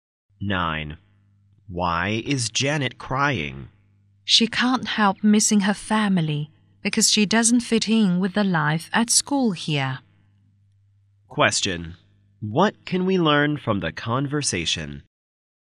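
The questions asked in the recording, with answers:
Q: What can we learn from the conversation?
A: Janet is homesick and hasn't adapted to school life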